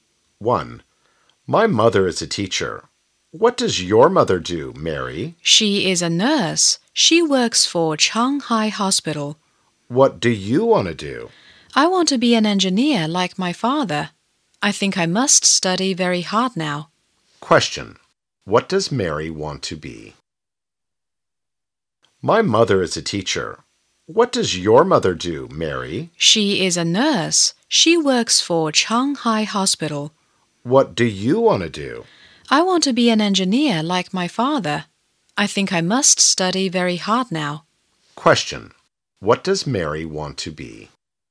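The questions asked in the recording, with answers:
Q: What does Mary want to be?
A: An engineer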